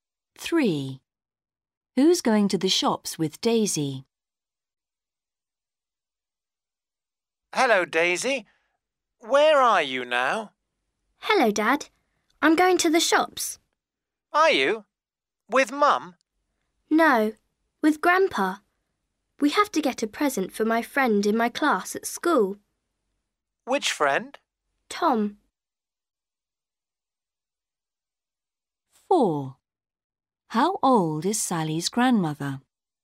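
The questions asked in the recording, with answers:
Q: Who's going to the shops with Daisy?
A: Her grandpa.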